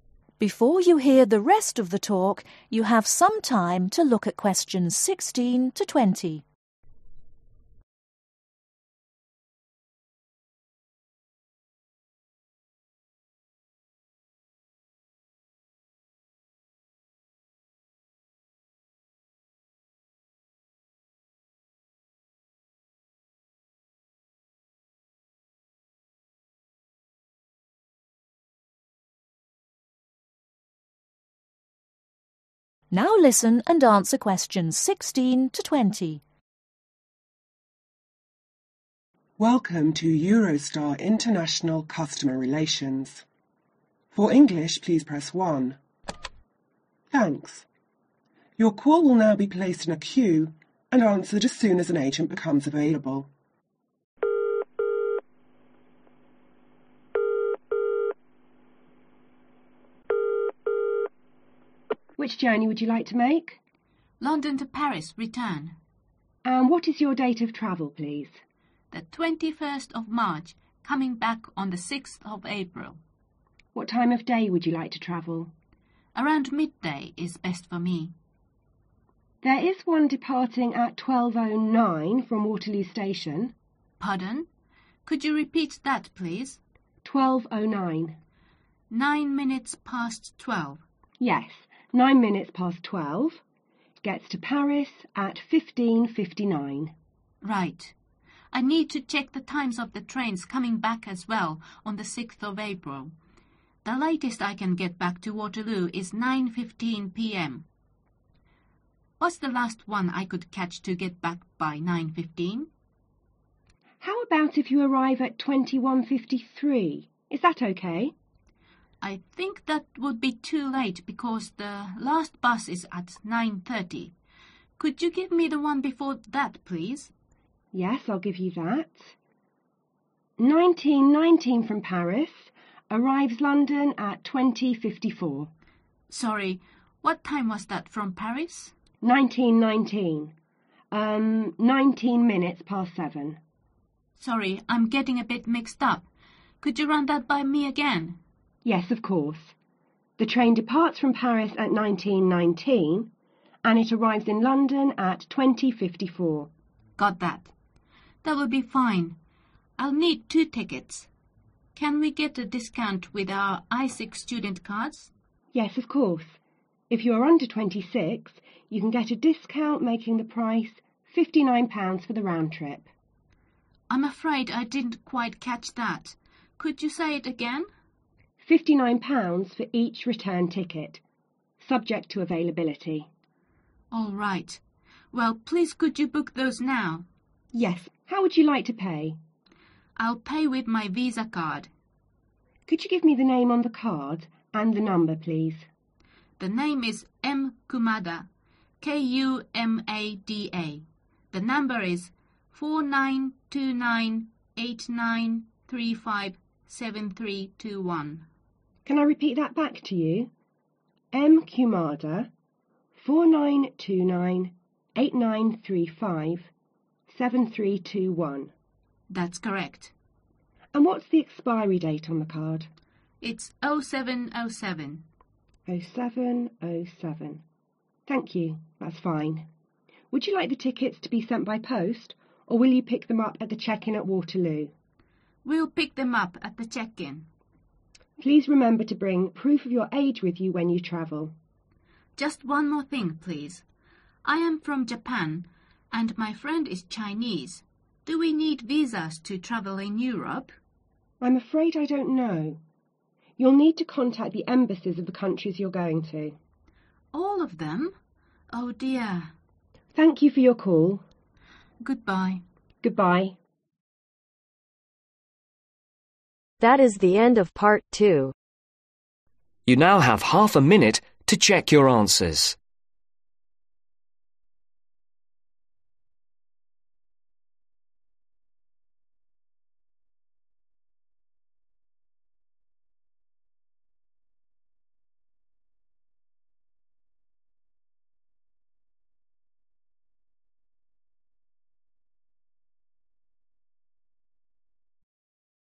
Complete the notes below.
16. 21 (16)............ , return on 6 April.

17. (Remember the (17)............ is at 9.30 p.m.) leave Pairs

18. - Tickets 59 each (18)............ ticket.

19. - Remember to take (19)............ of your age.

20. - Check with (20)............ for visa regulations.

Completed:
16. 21 March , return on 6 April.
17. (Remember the Bus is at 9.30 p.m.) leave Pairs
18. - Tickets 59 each Return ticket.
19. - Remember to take Proof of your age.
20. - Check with Embassies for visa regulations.